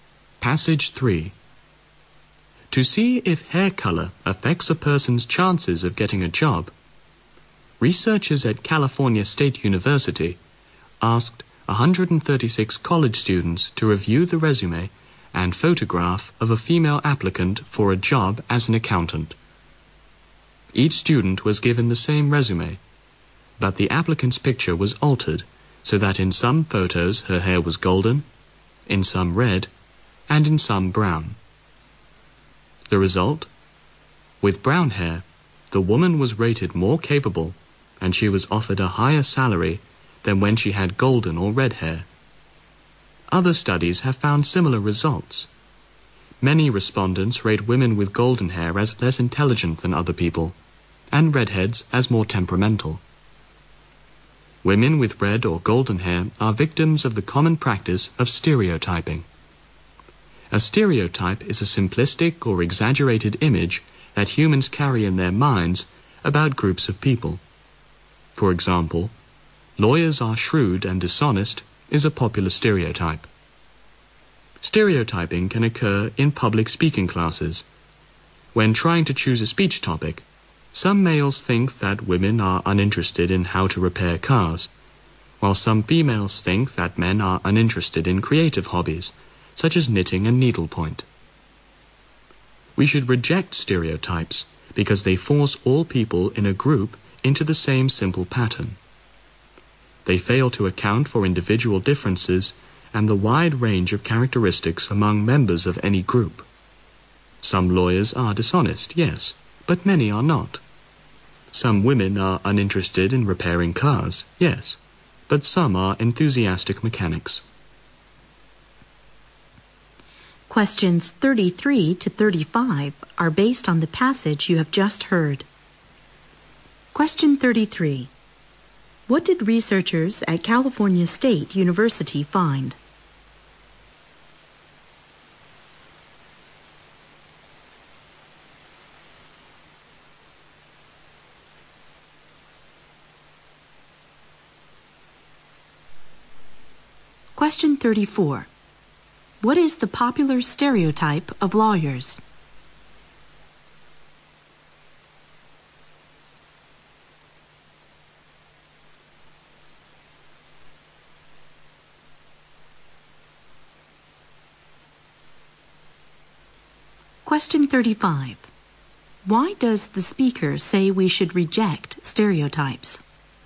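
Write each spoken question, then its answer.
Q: What did researchers at California State University find?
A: Hair color affected how the applicant was judged; with brown hair she was rated more capable and offered a higher salary.

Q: What is the popular stereotype of lawyers?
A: They are shrewd and dishonest.

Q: Why does the speaker say we should reject stereotypes?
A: They force everyone in a group into the same simple pattern and ignore individual differences.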